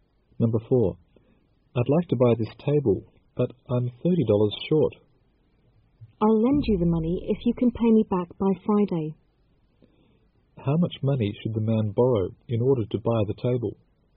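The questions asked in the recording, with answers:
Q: How much money should the man borrow in order to buy the table?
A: $30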